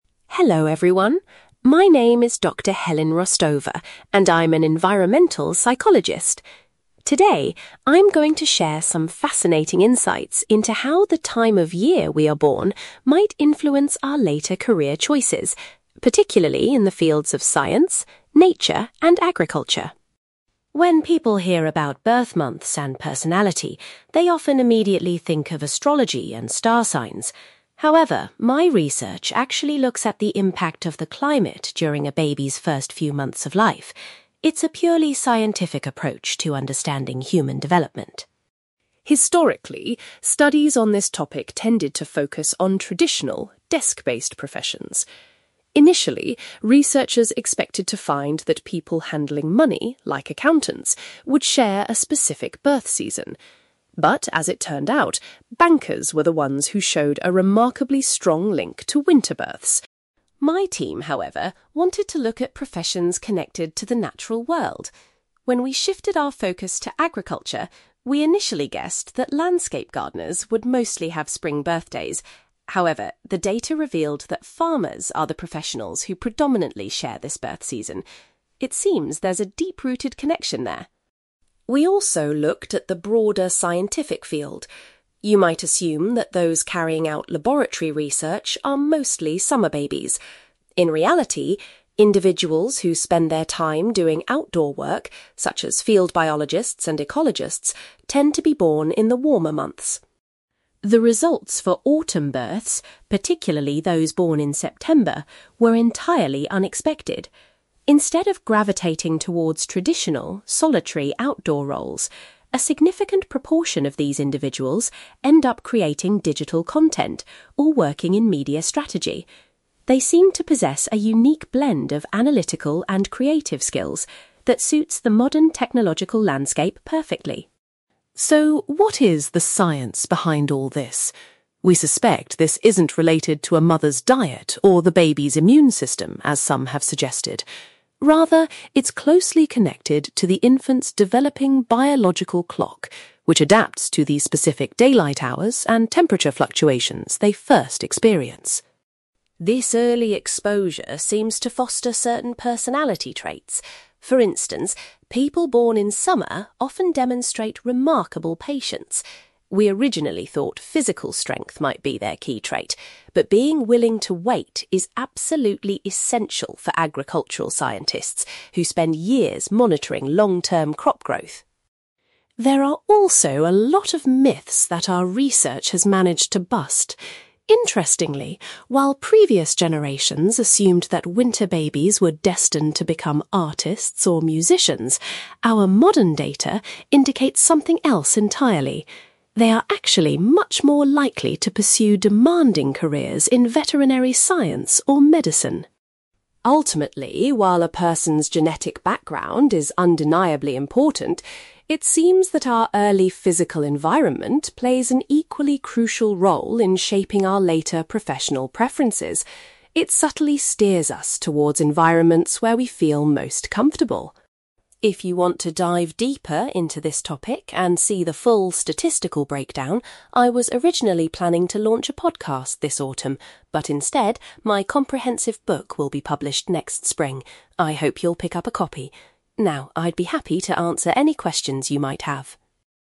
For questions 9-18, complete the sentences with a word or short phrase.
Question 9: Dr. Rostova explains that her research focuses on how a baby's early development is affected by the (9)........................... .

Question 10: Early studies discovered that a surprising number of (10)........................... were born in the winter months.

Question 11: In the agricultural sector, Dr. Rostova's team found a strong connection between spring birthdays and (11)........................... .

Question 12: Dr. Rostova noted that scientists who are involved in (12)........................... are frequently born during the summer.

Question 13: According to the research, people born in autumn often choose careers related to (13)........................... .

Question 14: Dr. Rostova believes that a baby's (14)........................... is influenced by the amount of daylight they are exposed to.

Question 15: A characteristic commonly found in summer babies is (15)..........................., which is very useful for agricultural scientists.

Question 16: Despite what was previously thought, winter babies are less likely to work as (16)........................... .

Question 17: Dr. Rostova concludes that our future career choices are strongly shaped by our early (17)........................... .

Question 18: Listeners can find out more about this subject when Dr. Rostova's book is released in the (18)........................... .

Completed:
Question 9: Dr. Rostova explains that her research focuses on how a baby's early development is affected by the climate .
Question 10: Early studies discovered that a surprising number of bankers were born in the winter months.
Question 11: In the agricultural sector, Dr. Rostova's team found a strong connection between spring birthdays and farmers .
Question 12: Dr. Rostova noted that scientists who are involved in outdoor work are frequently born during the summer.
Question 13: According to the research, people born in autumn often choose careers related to digital content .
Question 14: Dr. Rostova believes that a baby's biological clock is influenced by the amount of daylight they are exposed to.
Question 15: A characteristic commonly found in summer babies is patience, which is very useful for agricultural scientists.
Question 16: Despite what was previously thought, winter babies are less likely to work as artists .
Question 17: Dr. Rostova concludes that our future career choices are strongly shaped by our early physical environment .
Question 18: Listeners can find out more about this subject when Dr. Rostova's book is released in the spring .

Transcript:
Dr. Helen Rostova: Hello everyone. My name is Dr. Helen Rostova, and I'm an environmental psychologist. Today, I'm going to share some fascinating insights into how the time of year we are born might influence our later career choices, particularly in the fields of science, nature, and agriculture.
When people hear about birth months and personality, they often immediately think of astrology and star signs. However, my research actually looks at the impact of the climate during a baby's first few months of life. It's a purely scientific approach to understanding human development.
Historically, studies on this topic tended to focus on traditional, desk-based professions. Initially, researchers expected to find that people handling money, like accountants, would share a specific birth season. But, as it turned out, bankers were the ones who showed a remarkably strong link to winter births.
My team, however, wanted to look at professions connected to the natural world. When we shifted our focus to agriculture, we initially guessed that landscape gardeners would mostly have spring birthdays. However, the data revealed that farmers are the professionals who predominantly share this birth season. It seems there's a deep-rooted connection there.
We also looked at the broader scientific field. You might assume that those carrying out laboratory research are mostly summer babies. In reality, individuals who spend their time doing outdoor work, such as field biologists and ecologists, tend to be born in the warmer months.
The results for autumn births, particularly those born in September, were entirely unexpected. Instead of gravitating towards traditional, solitary outdoor roles, a significant proportion of these individuals end up creating digital content or working in media strategy. They seem to possess a unique blend of analytical and creative skills that suits the modern technological landscape perfectly.
So, what is the science behind all this? We suspect this isn't related to a mother's diet or the baby's immune system, as some have suggested. Rather, it's closely connected to the infant's developing biological clock, which adapts to the specific daylight hours and temperature fluctuations they first experience.
This early exposure seems to foster certain personality traits. For instance, people born in summer often demonstrate remarkable patience. We originally thought physical strength might be their key trait, but being willing to wait is absolutely essential for agricultural scientists who spend years monitoring long-term crop growth.
There are also a lot of myths that our research has managed to bust. Interestingly, while previous generations assumed that winter babies were destined to become artists or musicians, our modern data indicates something else entirely. They are actually much more likely to pursue demanding careers in veterinary science or medicine.
Ultimately, while a person's genetic background is undeniably important, it seems that our early physical environment plays an equally crucial role in shaping our later professional preferences. It subtly steers us towards environments where we feel most comfortable.
If you want to dive deeper into this topic and see the full statistical breakdown, I was originally planning to launch a podcast this autumn. But instead, my comprehensive book will be published next spring. I hope you'll pick up a copy. Now, I'd be happy to answer any questions you might have.

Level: B2